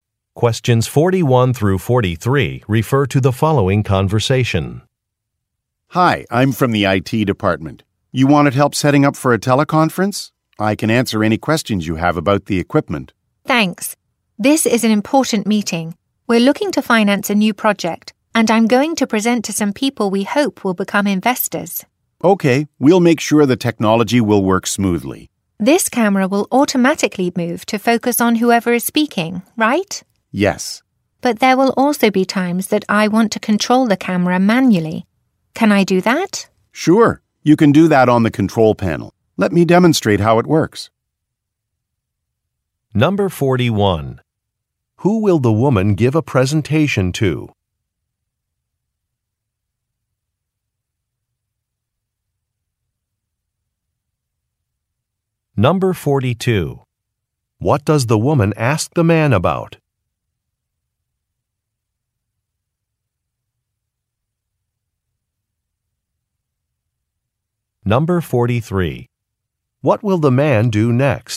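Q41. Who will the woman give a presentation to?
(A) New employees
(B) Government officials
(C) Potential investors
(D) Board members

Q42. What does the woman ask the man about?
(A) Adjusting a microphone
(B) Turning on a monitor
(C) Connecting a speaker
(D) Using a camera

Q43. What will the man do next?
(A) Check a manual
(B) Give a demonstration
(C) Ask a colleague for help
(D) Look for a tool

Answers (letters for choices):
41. C
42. D
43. B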